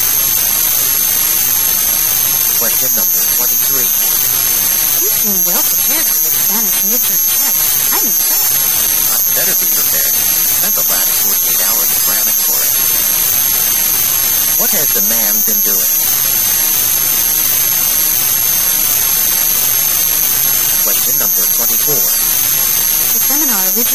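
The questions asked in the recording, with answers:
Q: What has the man been doing?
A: Studying intensively for the Spanish test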